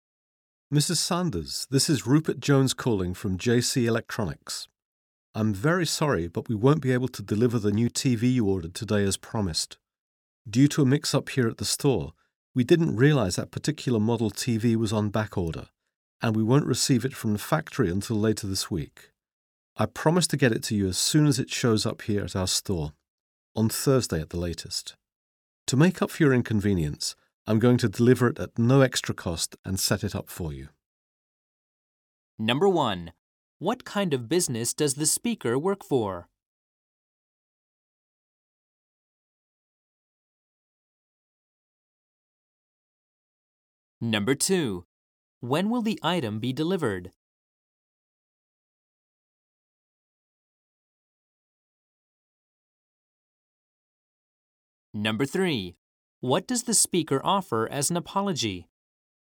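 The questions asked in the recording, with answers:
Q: What kind of business does the speaker work for?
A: An electronics store

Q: When will the item be delivered?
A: By Thursday at the latest

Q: What does the speaker offer as an apology?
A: Free delivery and setup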